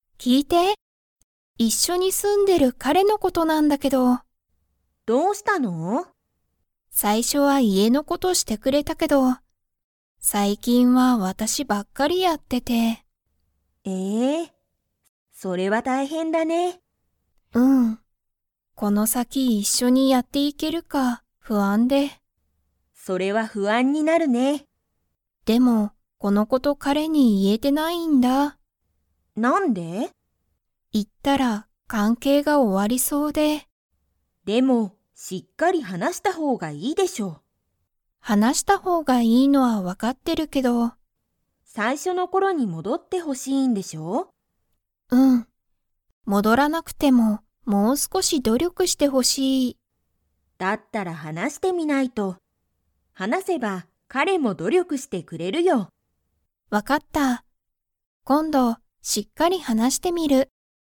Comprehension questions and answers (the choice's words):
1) 最近さいきんは、家いえの事ことを ばっかりやってる。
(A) ミホ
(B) ミホのお父とうさん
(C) ミホの彼かれ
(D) ミホのお母かあさん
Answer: ミホ

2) ミホは、今度こんどしっかり話はなしてみますか?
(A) はい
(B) いいえ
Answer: はい

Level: Level 3